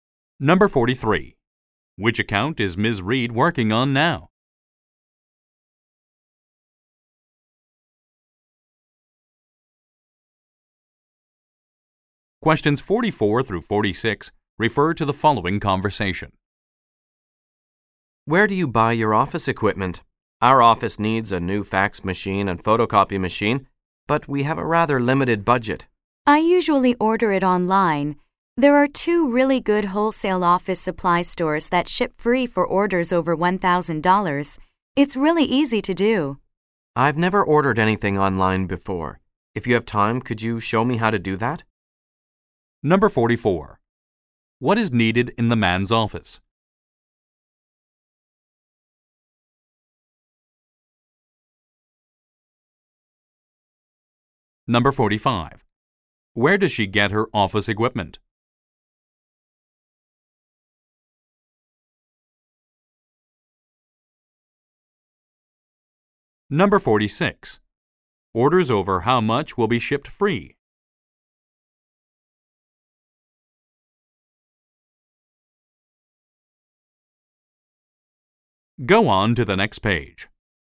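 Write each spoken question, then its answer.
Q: What is needed in the man's office?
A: A new fax machine and photocopy machine

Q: Where does she get her office equipment?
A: Online, from wholesale office supply stores

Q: Orders over how much will be shipped free?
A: $1,000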